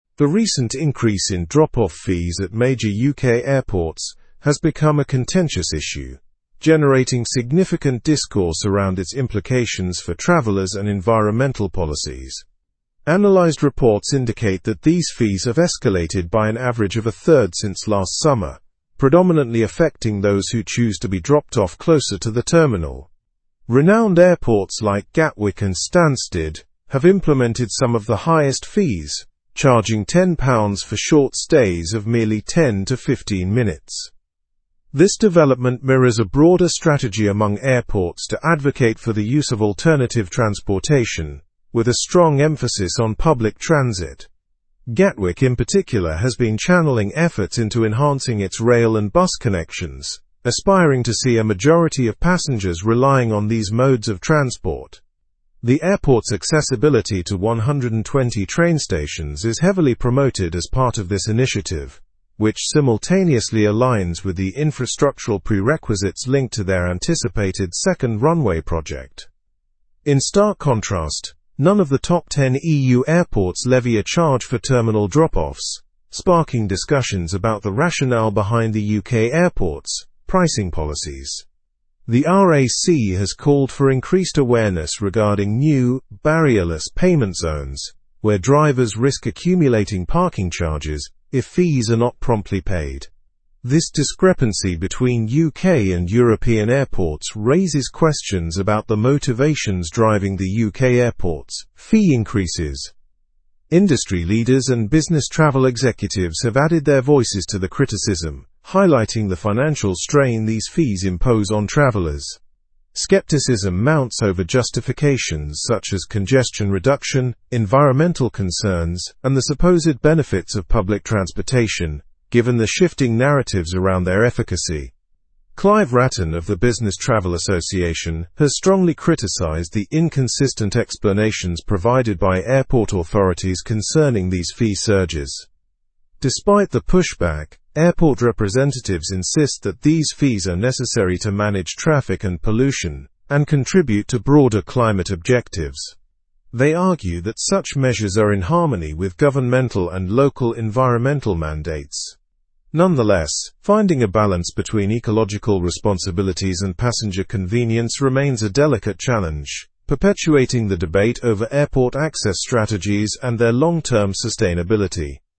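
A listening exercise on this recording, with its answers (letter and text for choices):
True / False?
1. Gatwick has connections to 120 train stations.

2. Drop-off fees at UK airports have decreased by an average of a third since last summer.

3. All of the top ten EU airports impose a drop-off charge.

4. The RAC alerted drivers about 'barrierless' payment zones.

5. There is support regarding the consistency of the justifications for fee increases.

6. Airport representatives claim managing vehicle activity helps meet climate objectives.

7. Gatwick and Stansted charge some of the highest drop-off fees among UK airports.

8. The airports aim to discourage travelers from using public transportation.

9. What has happened to drop-off fees at UK airports?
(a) They have decreased.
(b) They have remained the same.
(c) They have been eliminated.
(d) They have increased.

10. What fee does Gatwick charge for a 10-minute drop-off?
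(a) £5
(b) £10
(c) £15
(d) £20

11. What do airports hope to encourage with the fee changes?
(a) More parking infrastructure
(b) The use of public transport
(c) Increases in airport taxis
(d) Private car hires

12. How many train stations does Gatwick connect to?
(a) 100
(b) 150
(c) 200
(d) 120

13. Which organization warned about the new 'barrierless' payment zones?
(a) RAC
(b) AA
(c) The Department for Transport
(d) South East Travel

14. How do the UK airports compare with the top ten EU airports regarding drop-off fees?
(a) EU airports charge fees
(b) Both regions charge equally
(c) UK airports charge fees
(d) Neither charges fees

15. Who criticized the consistency of justifications for fee hikes?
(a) John Smith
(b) David Brown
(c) Clive Wratten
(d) Michael Carey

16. What signifies airport representatives' stance on the fees?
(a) They align with climate goals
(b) They are solely for profit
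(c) They are unnecessary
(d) They disrupt travel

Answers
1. True
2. False
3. False
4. True
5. False
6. True
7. True
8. False
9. (d) They have increased.
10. (b) £10
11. (b) The use of public transport
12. (d) 120
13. (a) RAC
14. (c) UK airports charge fees
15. (c) Clive Wratten
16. (a) They align with climate goals

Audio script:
The recent increase in drop-off fees at major UK airports has become a contentious issue, generating significant discourse around its implications for travelers and environmental policies. Analyzed reports indicate that these fees have escalated by an average of a third since last summer, predominantly affecting those who choose to be dropped off closer to the terminal. Renowned airports like Gatwick and Stansted have implemented some of the highest fees, charging £10 for short stays of merely 10 to 15 minutes.
This development mirrors a broader strategy among airports to advocate for the use of alternative transportation, with a strong emphasis on public transit. 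Gatwick, in particular, has been channeling efforts into enhancing its rail and bus connections, aspiring to see a majority of passengers relying on these modes of transport. The airport's accessibility to 120 train stations is heavily promoted as part of this initiative, which simultaneously aligns with the infrastructural prerequisites linked to their anticipated second runway project.
In stark contrast, none of the top ten EU airports levy a charge for terminal drop-offs, sparking discussions about the rationale behind the UK airports' pricing policies. The RAC has called for increased awareness regarding new 'barrierless' payment zones, where drivers risk accumulating parking charges if fees are not promptly paid. This discrepancy between UK and European airports raises questions about the motivations driving the UK airports' fee increases.
Industry leaders and business travel executives have added their voices to the criticism, highlighting the financial strain these fees impose on travelers. 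Skepticism mounts over justifications such as congestion reduction, environmental concerns, and the supposed benefits of public transportation, given the shifting narratives around their efficacy. Clive Wratten of the Business Travel Association has strongly criticized the inconsistent explanations provided by airport authorities concerning these fee surges.
Despite the pushback, airport representatives insist that these fees are necessary to manage traffic and pollution, and contribute to broader climate objectives.
the pushback, airport representatives insist that these fees are necessary to manage traffic and pollution, and contribute to broader climate objectives. They argue that such measures are in harmony with governmental and local environmental mandates. Nonetheless, finding a balance between ecological responsibilities and passenger convenience remains a delicate ?, perpetuating the debate over airport access strategies and their long-term sustainability.

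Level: Level 4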